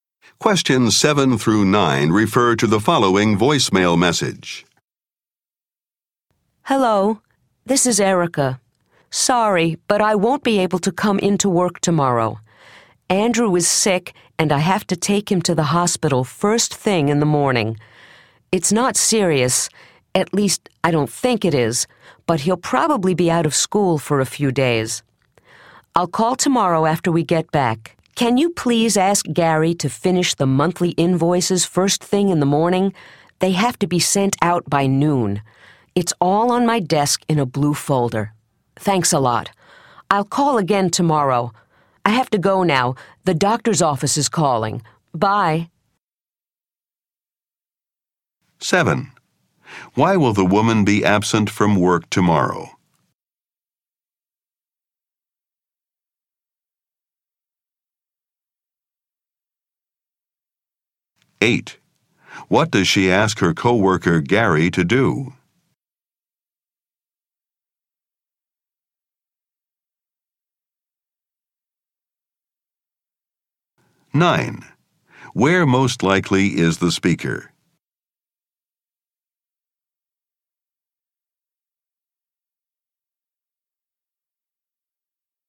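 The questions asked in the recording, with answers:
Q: Why will the woman be absent from work tomorrow?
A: She has to take Andrew, who is sick, to the hospital

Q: What does she ask her co-worker Gary to do?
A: Finish the monthly invoices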